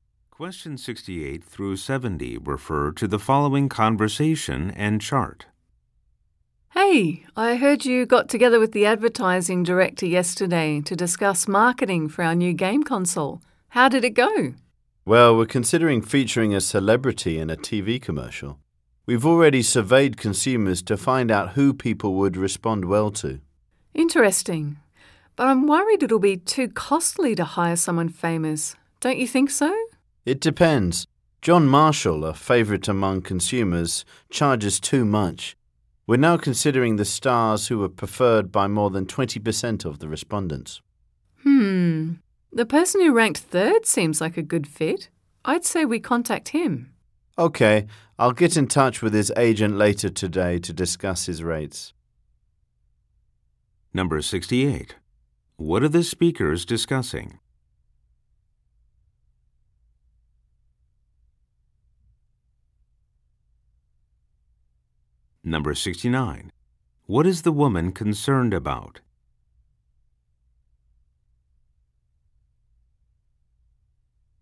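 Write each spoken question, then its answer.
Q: What are the speakers discussing?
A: Marketing for the new game console with a celebrity commercial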